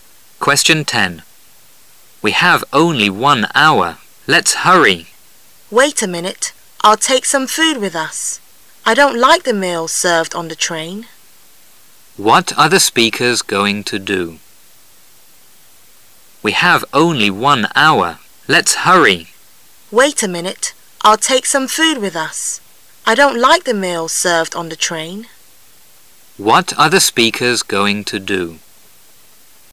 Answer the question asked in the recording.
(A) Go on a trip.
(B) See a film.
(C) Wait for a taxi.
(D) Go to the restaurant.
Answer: (A) Go on a trip.

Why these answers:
How about doing sth? 是用来提出建议邀请的一种句式,意为"去...怎么样?"。选项[A]I'd love to,but I'll have a class"我很想去:但我要上课"是无法接受邀请的一种委婉表达方式。